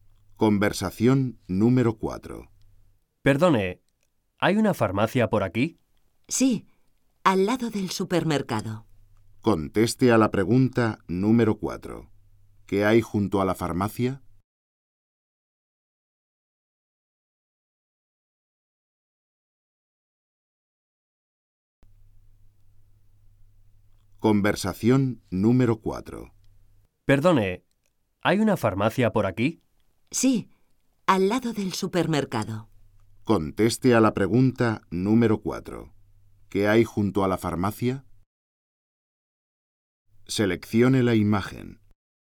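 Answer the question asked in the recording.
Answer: El supermercado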